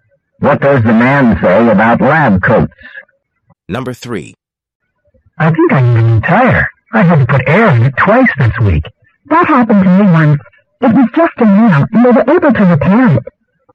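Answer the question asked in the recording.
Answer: The tire may only need to be repaired, not replaced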